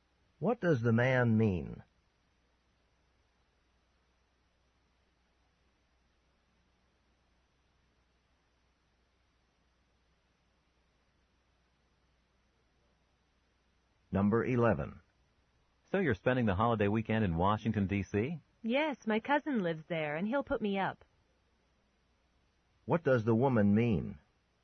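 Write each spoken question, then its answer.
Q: What does the woman mean?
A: She will stay with her cousin.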